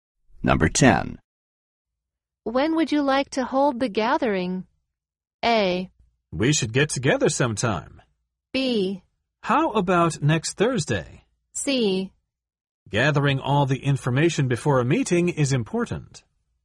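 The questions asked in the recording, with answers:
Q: When would you like to hold the gathering?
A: B: How about next Thursday?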